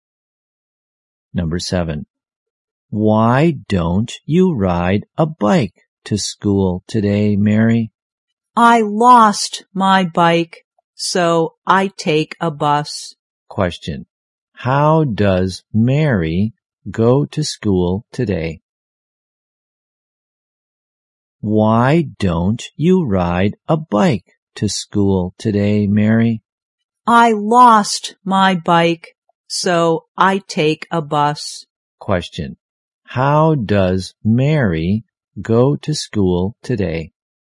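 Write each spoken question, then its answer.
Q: How does Mary go to school today?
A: By bus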